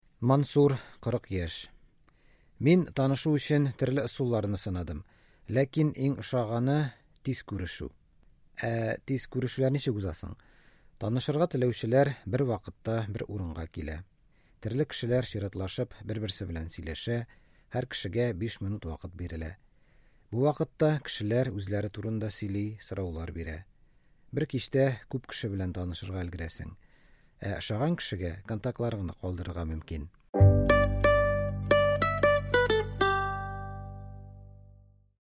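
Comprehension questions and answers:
Бирем. Ответьте на вопросы по тексту.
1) Тиз күрешүләр ничек уза?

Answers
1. Танышырга теләүчеләр бер вакытта бер урынга килә, чиратлашып сөйләшә, һәр кешегә 5 минут бирелә.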